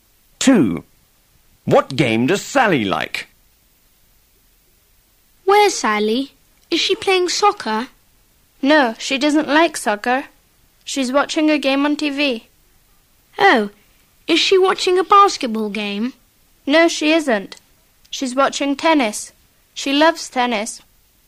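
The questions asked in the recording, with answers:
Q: What game does Sally like?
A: Tennis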